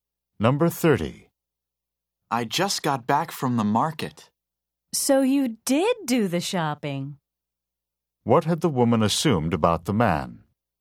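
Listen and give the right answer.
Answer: That he had not done the shopping.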